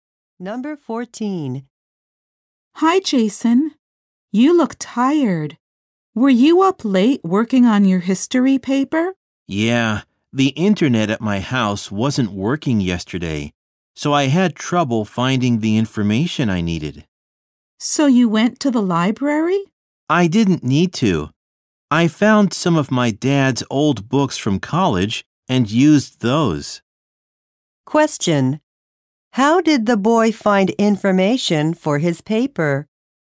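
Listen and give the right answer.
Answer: He used his dad's old college books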